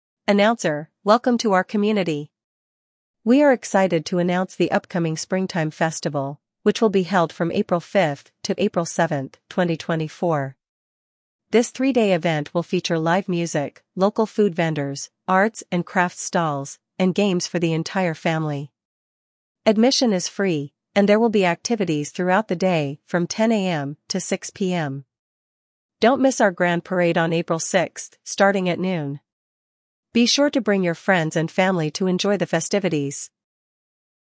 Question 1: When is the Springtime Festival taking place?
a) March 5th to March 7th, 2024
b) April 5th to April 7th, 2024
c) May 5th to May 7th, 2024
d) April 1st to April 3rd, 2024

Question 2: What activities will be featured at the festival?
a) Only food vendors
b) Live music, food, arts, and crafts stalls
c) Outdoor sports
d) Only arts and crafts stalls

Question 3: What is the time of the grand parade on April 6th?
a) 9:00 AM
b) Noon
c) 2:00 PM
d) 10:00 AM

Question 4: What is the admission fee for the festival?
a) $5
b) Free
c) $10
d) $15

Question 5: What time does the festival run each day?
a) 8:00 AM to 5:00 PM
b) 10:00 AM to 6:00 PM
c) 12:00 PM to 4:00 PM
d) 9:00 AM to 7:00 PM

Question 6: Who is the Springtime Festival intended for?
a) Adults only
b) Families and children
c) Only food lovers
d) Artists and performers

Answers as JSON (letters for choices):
{"1": "b", "2": "b", "3": "b", "4": "b", "5": "b", "6": "b"}

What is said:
Announcer: "Welcome to our community! We are excited to announce the upcoming Springtime Festival, which will be held from April 5th to April 7th, 2024. This three-day event will feature live music, local food vendors, arts and crafts stalls, and games for the entire family. Admission is free, and there will be activities throughout the day from 10:00 AM to 6:00 PM. Don't miss our grand parade on April 6th, starting at noon. Be sure to bring your friends and family to enjoy the festivities."